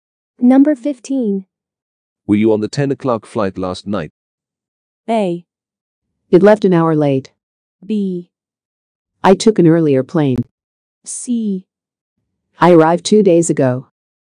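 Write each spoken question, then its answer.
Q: Were you on the 10 o'clock flight last night?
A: B: I took an earlier plane.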